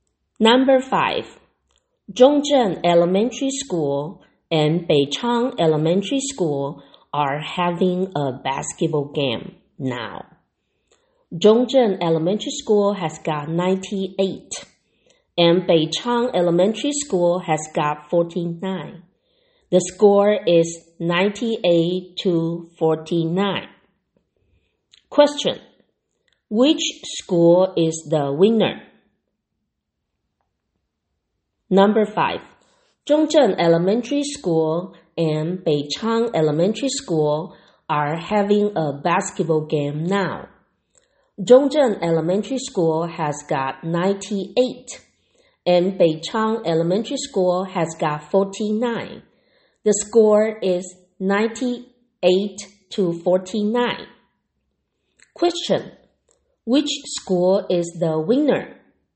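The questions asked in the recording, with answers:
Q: Which school is the winner?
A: Zhongzhen Elementary School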